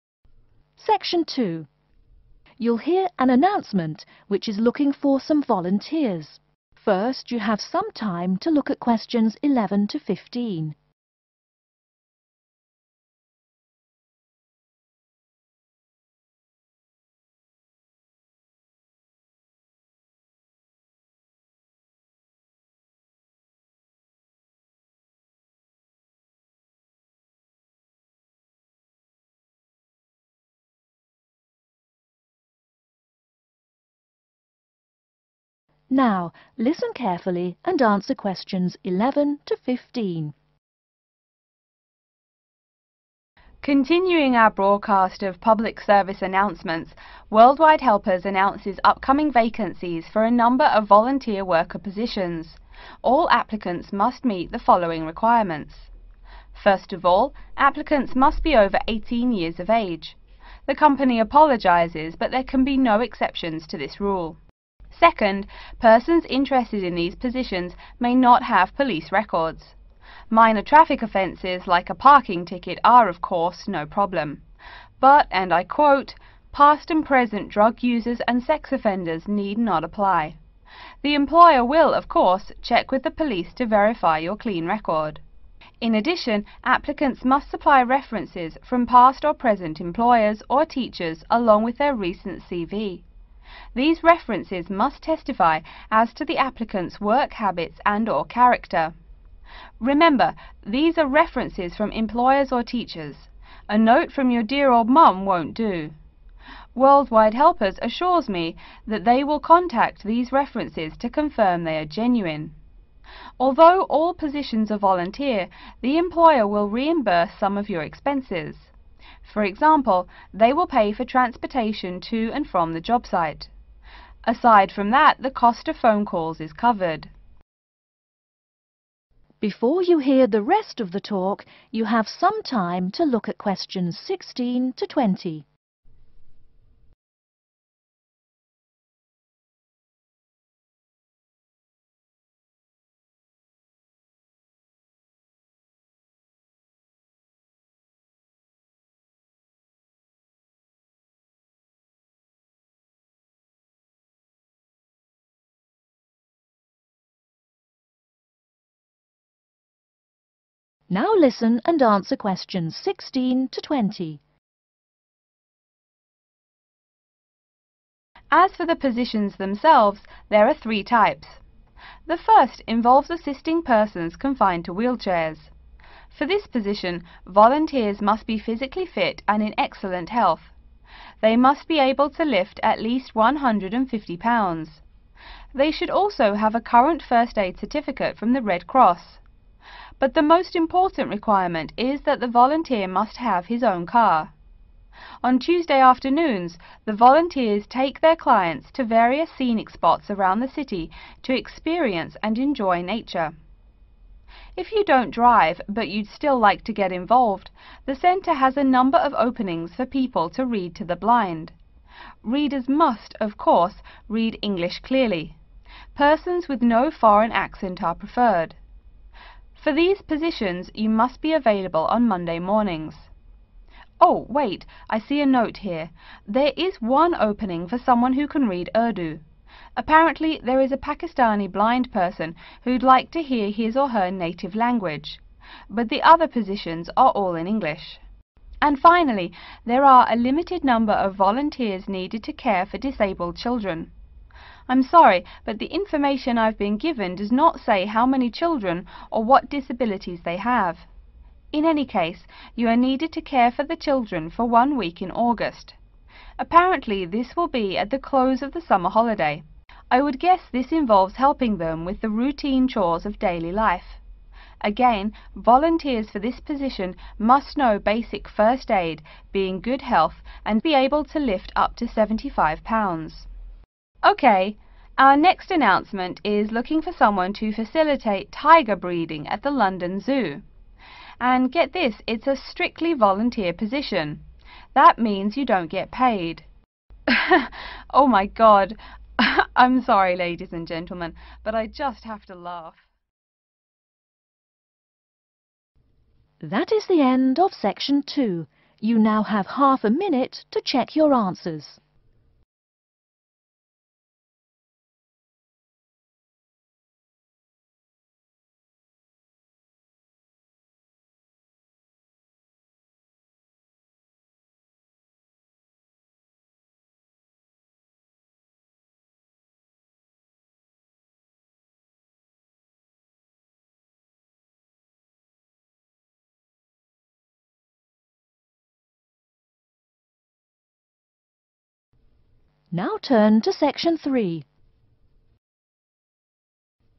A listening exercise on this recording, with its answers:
Write NO MORE THAN TWO WORDS OR A NUMBER for each answer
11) Volunteer workers must be at least 11.............. years old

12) Job applicants should not have 12..............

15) The employer will pay the expenses of 15.............. and phone calls.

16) must own a First Aid certificate from the 16..............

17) 17..............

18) No 18.............. is an advantage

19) 19.............. Take care of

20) 20..............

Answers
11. 18
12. police records
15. transportation
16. Red Cross
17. Tuesday afternoons
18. foreign accent
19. Disabled Children
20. 75